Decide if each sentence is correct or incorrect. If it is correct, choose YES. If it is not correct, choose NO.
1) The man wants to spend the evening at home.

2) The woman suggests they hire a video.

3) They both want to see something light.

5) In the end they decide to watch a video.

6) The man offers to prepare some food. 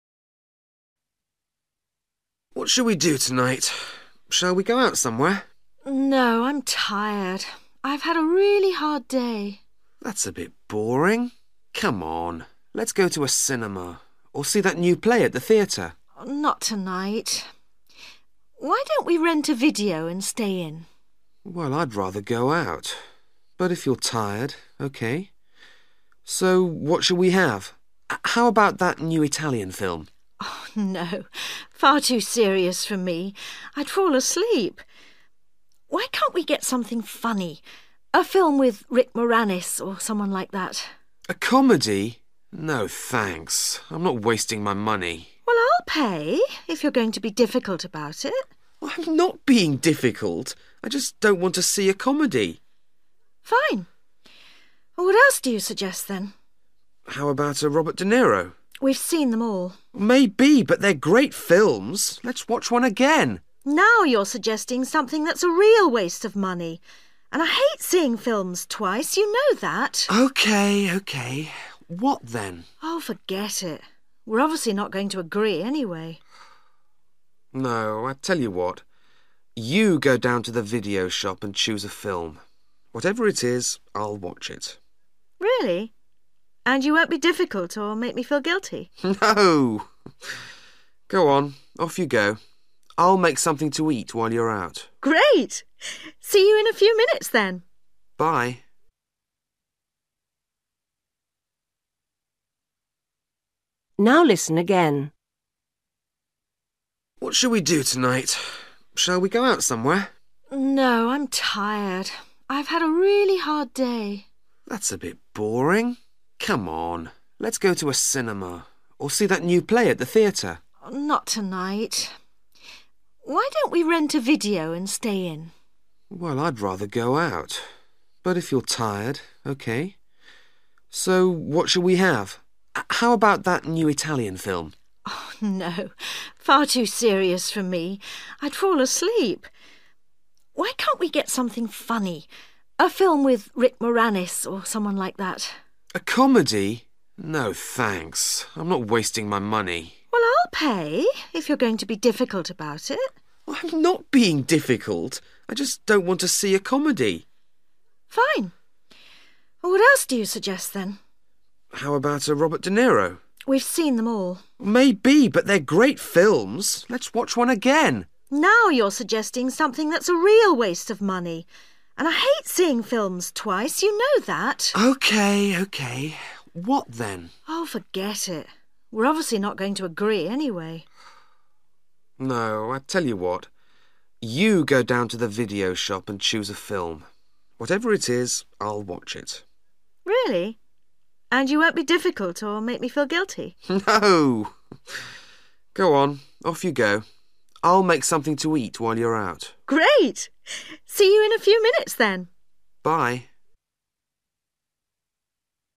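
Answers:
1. YES
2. NO
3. NO
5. YES
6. YES

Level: Luyện nghe trình độ B1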